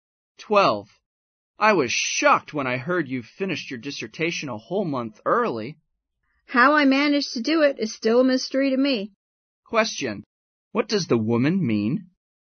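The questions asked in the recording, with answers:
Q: What does the woman mean?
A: She doesn't know how she managed to finish early.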